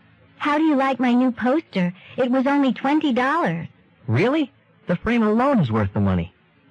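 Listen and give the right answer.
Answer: The poster was a bargain; the frame alone is worth $20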